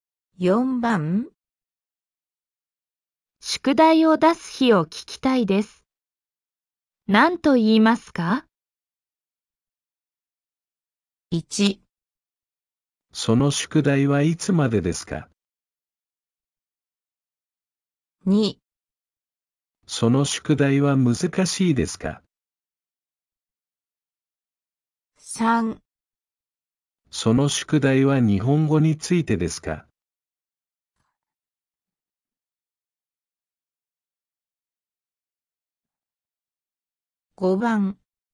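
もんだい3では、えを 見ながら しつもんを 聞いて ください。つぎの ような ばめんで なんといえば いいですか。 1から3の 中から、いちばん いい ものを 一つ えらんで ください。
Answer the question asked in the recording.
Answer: 1

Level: N4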